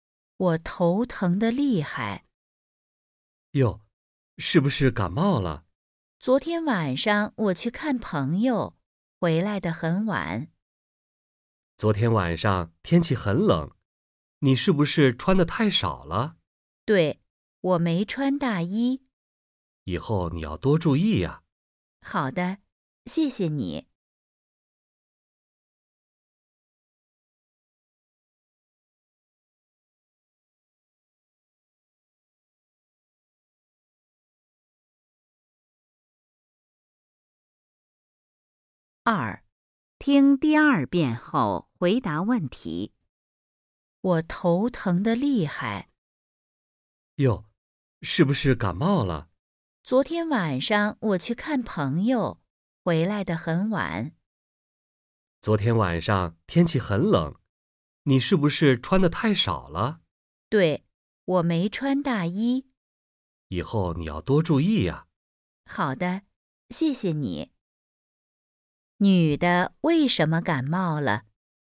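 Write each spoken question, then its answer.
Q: 女的为什么感冒了?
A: 昨天晚上天气很冷,她没穿大衣,穿得太少了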